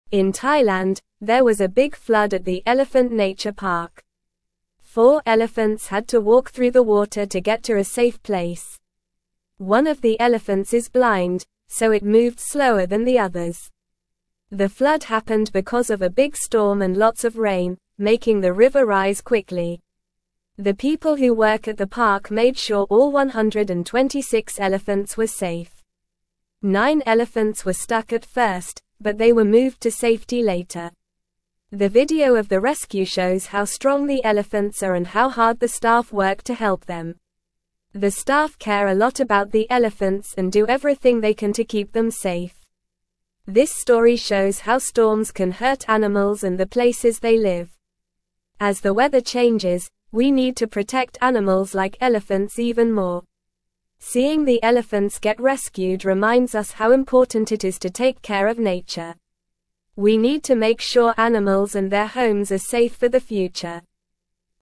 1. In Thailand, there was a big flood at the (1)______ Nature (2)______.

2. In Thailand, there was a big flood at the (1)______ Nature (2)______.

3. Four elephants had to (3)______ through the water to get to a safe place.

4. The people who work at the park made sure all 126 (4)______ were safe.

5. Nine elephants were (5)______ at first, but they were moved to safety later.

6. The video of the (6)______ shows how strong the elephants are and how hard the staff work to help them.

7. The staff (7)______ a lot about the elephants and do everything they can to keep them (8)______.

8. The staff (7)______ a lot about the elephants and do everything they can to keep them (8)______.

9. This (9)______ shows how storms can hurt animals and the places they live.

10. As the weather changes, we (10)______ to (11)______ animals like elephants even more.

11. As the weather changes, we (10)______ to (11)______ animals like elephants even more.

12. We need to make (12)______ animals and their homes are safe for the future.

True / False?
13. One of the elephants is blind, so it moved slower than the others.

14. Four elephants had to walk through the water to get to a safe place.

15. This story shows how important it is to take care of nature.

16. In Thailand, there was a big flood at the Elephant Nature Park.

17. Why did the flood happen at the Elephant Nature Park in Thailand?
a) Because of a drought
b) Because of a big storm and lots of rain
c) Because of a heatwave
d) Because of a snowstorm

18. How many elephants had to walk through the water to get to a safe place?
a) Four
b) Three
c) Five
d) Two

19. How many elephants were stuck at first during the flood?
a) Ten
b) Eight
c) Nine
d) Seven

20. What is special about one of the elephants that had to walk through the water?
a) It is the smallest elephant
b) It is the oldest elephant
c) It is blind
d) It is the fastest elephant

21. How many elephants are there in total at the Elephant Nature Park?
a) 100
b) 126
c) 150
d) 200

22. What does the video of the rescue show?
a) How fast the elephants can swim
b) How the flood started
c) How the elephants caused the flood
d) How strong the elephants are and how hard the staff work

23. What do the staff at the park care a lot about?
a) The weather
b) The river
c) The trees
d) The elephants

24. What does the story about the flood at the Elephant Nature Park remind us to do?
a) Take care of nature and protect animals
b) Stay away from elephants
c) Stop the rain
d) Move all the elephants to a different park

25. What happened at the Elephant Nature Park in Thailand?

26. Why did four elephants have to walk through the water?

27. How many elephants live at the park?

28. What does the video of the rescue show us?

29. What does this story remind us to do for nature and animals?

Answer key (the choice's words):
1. Elephant
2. Park
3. walk
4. elephants
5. stuck
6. rescue
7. care
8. safe
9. story
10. need
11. protect
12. sure
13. True
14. True
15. True
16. True
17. Because of a big storm and lots of rain
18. Four
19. Nine
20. It is blind
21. 126
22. How strong the elephants are and how hard the staff work
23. The elephants
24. Take care of nature and protect animals
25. There was a big flood at the Elephant Nature Park in Thailand.
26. They had to walk through the water to get to a safe place because of the flood.
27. There are 126 elephants that live at the park.
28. The video shows how strong the elephants are and how hard the staff work to help them.
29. This story reminds us to take care of nature and make sure animals and their homes are safe.

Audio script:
The flood happened because of a big storm and lots of rain, making the river rise quickly.
The people who work at the park made sure all 126 elephants were safe. Nine elephants were stuck at first, but they were moved to safety later. The video of the rescue shows how strong the elephants are and how hard the staff work to help them. The staff care a lot about the elephants and do everything they can to keep them safe.
This story shows how storms can hurt animals and the places they live. As the weather changes, we need to protect animals like elephants even more. Seeing the elephants get rescued reminds us how important it is to take care of nature. We need to make sure animals and their homes are safe for the future.

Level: Level 2